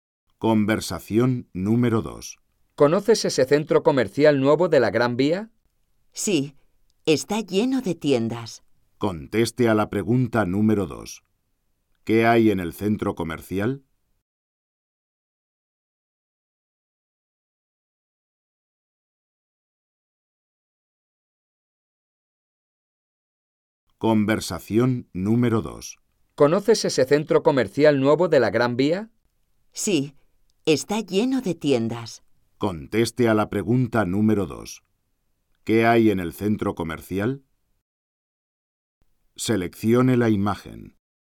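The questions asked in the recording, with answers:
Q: ¿Qué hay en el centro comercial?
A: Tiendas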